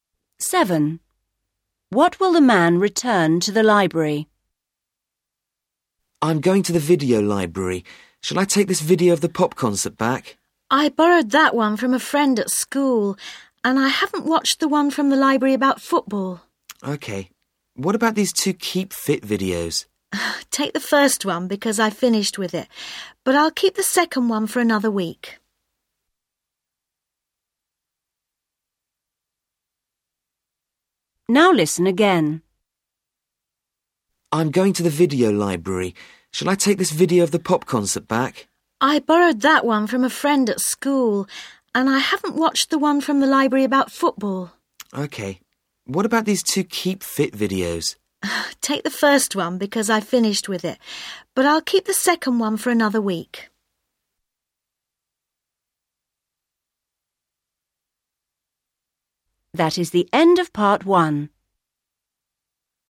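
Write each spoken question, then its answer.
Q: What will the man return to the library?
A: The first Keep Fit video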